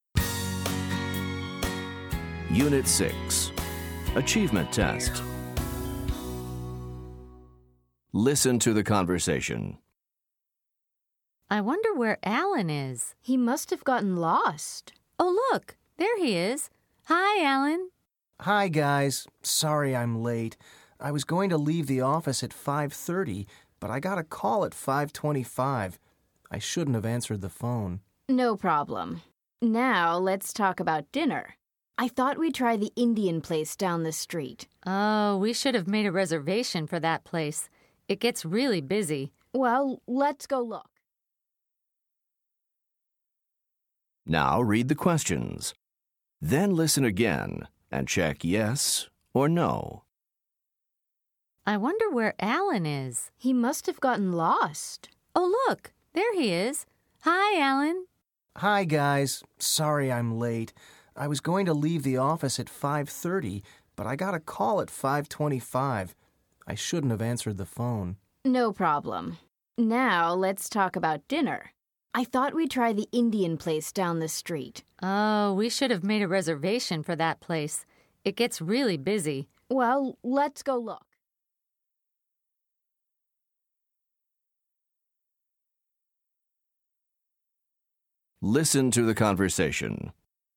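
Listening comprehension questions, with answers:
Listen to the conversation. Then choose Yes or No to answer each question.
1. Did Alan leave the office at 5:30?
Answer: No

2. Did Alan answer the phone?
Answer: Yes

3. Did they make a reservation at the restaurant?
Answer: No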